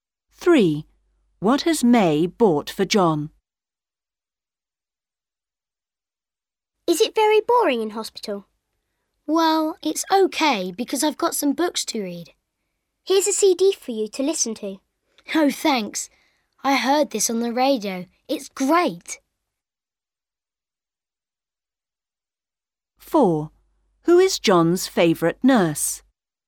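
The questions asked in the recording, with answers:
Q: What has May bought for John?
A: A CD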